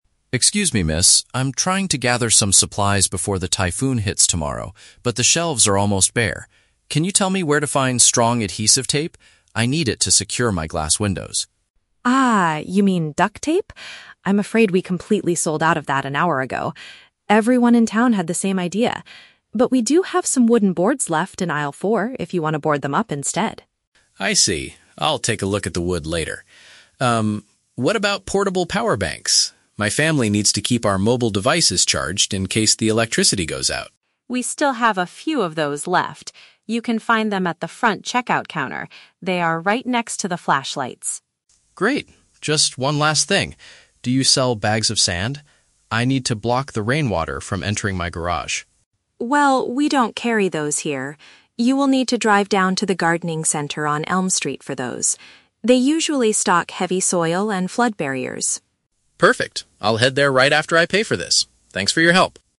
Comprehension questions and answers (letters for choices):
Listen to a conversation between a customer and a store clerk, and choose the correct answer (A, B, or C) for each question.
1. What does the man initially want to buy to protect his windows?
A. Pieces of wood.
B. Heavy-duty tape.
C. Thick plastic sheets.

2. Where can the customer find the devices to charge his phone?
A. In aisle four of the store.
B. Next to the radio equipment.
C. Near the cash register.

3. Why does the clerk tell the man to go to the gardening center?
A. Because he needs materials to prevent his garage from flooding.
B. Because he wants to buy some plants to keep inside during the storm.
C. Because the hardware store is closing earlier than usual today.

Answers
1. B
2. C
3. A

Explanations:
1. The customer asks for "strong adhesive tape" to secure his windows, and the clerk confirms he means "duct tape". "Heavy-duty tape" is a paraphrase of this item.
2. The clerk says the portable power banks (devices to charge his phone) are at the "front checkout counter". "Cash register" is a synonym for checkout counter.
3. The customer asks for "bags of sand" to "block the rainwater from entering my garage". The clerk directs him to the gardening center for "flood barriers". Preventing his garage from flooding is a direct paraphrase of blocking the rainwater.

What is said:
Customer: Excuse me, miss? I'm trying to gather some supplies before the typhoon hits tomorrow, but the shelves are almost bare. Can you tell me where to find strong adhesive tape? I need it to secure my glass windows.
Clerk: Ah, you mean duct tape? I'm afraid we completely sold out of that an hour ago. Everyone in town had the same idea. But we do have some wooden boards left in aisle four if you want to board them up instead.
Customer: I see. I'll take a look at the wood later. Um, what about portable power banks? My family needs to keep our mobile devices charged in case the electricity goes out.
Clerk: We still have a few of those left. You can find them at the front checkout counter. They are right next to the flashlights.
Customer: Great. Just one last thing... do you sell bags of sand? I need to block the rainwater from entering my garage.
Clerk: Well, we don't carry those here. You will need to drive down to the gardening center on Elm Street for those. They usually stock heavy soil and flood barriers.